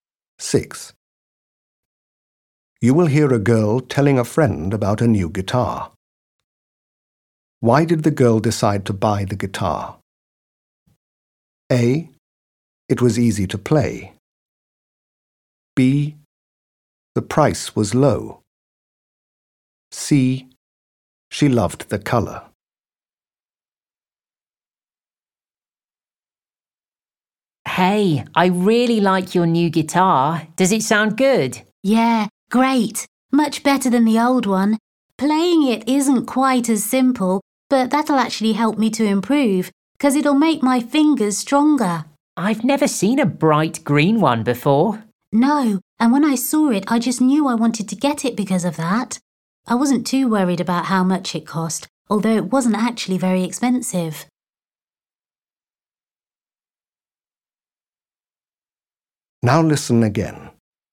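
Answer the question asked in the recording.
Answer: C: She loved the color.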